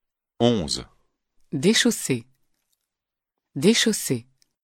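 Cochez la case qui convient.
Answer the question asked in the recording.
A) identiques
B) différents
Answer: A) identiques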